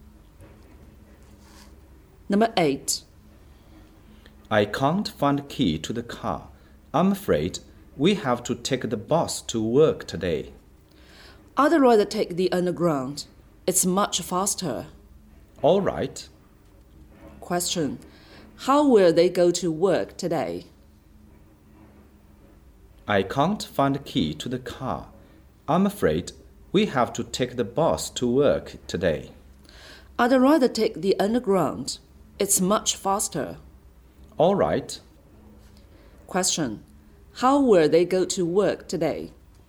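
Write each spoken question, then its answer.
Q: How will they go to work today?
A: By underground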